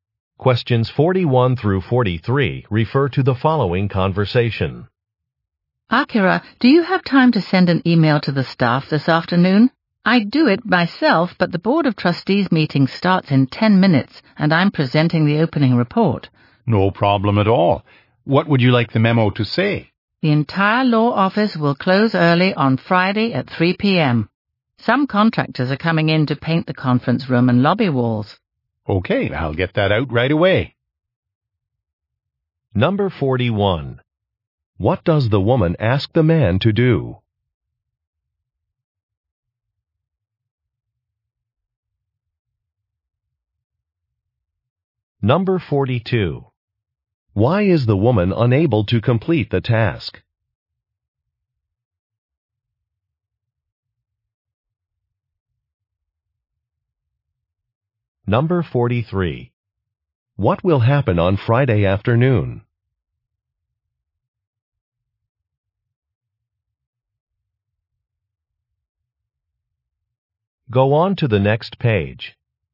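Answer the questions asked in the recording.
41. Send an email to the staff
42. She is presenting at a board meeting
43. The office will close early for painting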